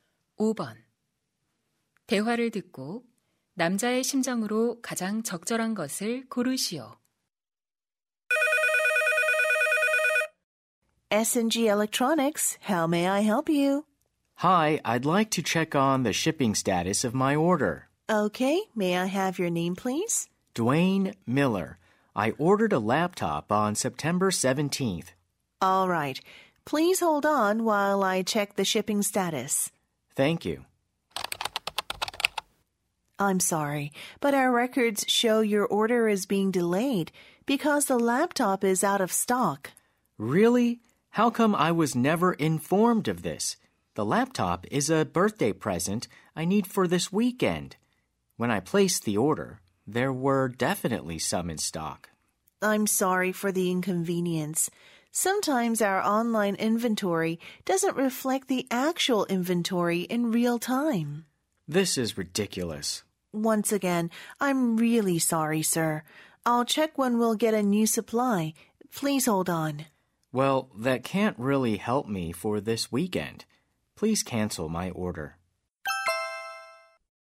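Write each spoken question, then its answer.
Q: 대화를 듣고 남자의 심정으로 가장 적절한 것을 고르시오.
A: 짜증남, 실망함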